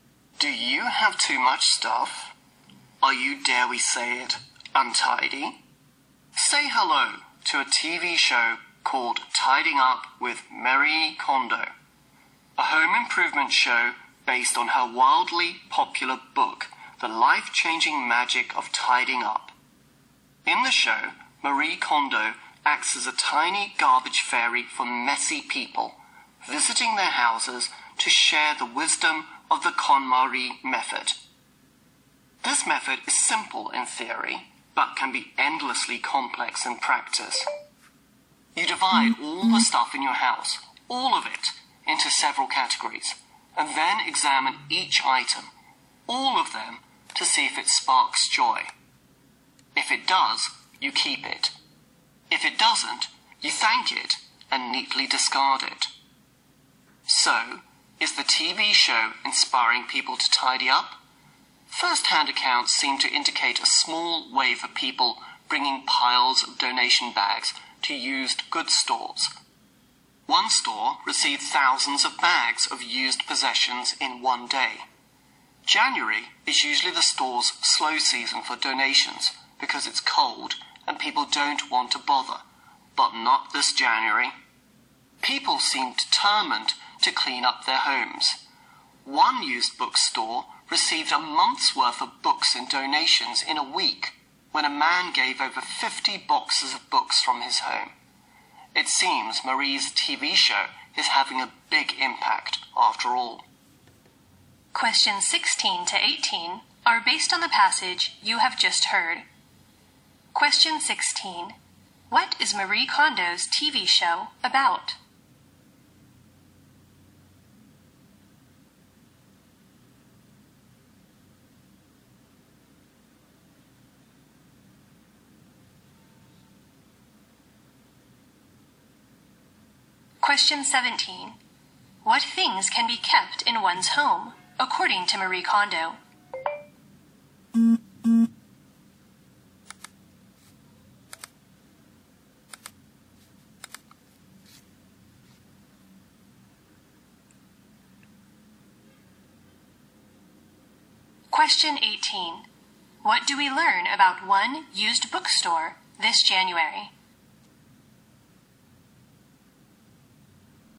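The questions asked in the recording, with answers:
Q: What is Marie Kondo's TV show about?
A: How to tidy up messy homes

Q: What things can be kept in one's home, according to Marie Kondo?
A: Things that spark joy

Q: What do we learn about one used bookstore this January?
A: It received a month's worth of books and donations in a week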